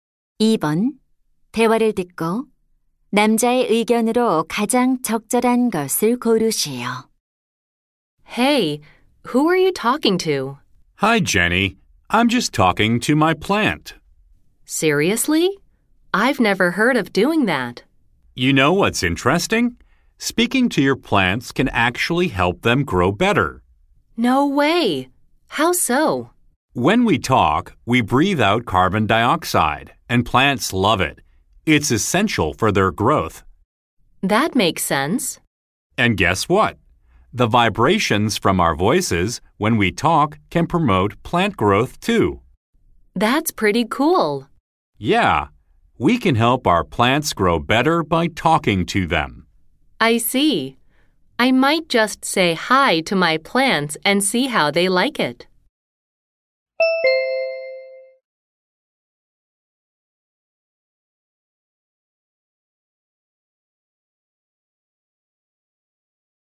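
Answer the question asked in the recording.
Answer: 식물에게 말을 걸면 식물이 더 잘 자란다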